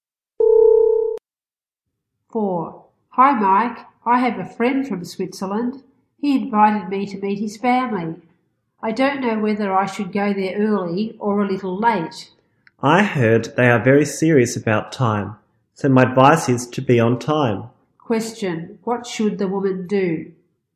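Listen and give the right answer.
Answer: Be on time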